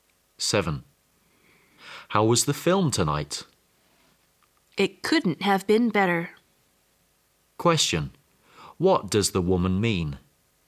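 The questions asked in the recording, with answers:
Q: What does the woman mean?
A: The film was excellent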